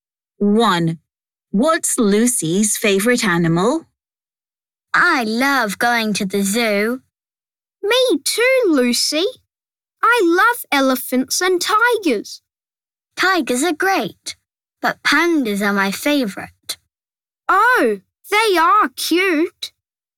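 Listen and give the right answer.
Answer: pandas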